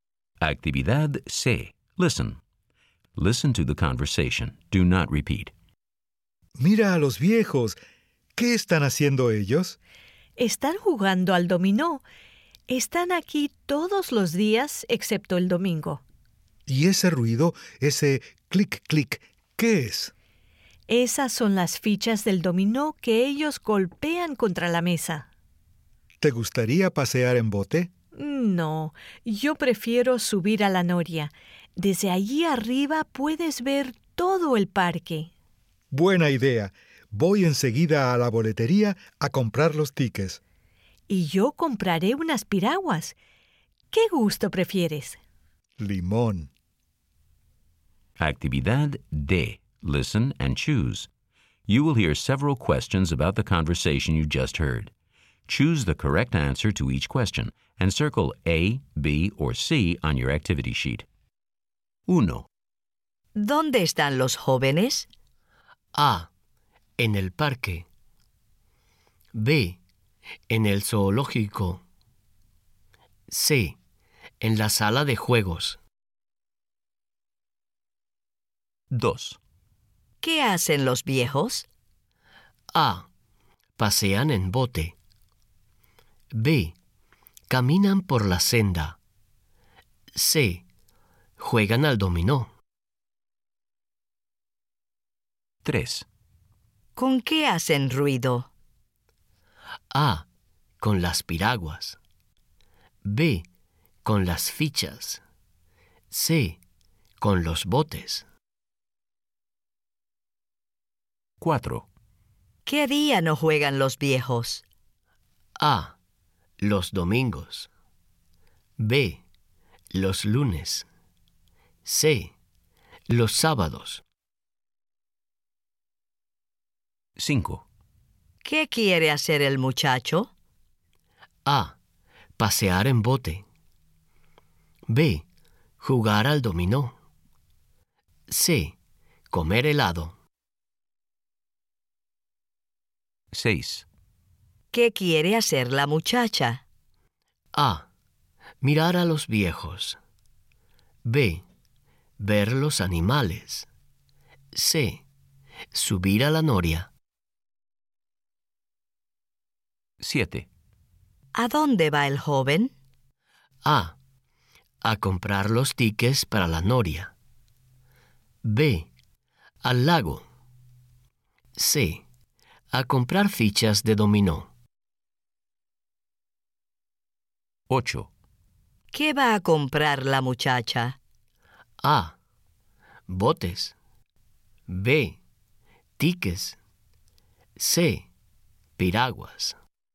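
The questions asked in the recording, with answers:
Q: ¿Dónde están los jóvenes?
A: A: En el parque.

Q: ¿Qué hacen los viejos?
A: C: Juegan al dominó.

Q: ¿Con qué hacen ruido?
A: B: Con las fichas.

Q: ¿Qué día no juegan los viejos?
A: A: Los domingos.

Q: ¿Qué quiere hacer el muchacho?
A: A: Pasear en bote.

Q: ¿Qué quiere hacer la muchacha?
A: C: Subir a la noria.

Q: ¿A dónde va el joven?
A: A: A comprar los tickets para la noria.

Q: ¿Qué va a comprar la muchacha?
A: C: Piraguas.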